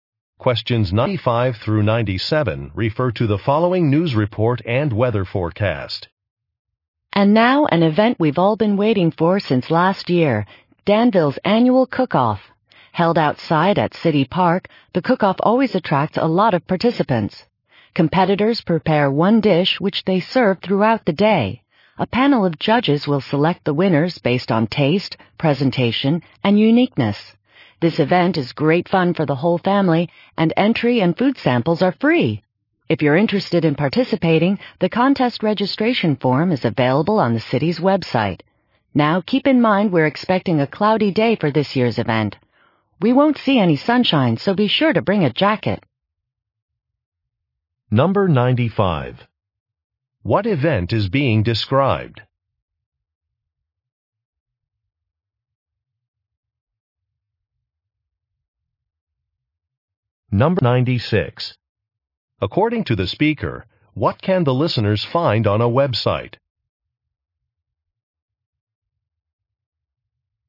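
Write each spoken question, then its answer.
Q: What event is being described?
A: A cooking competition

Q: According to the speaker, what can the listeners find on a website?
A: A registration form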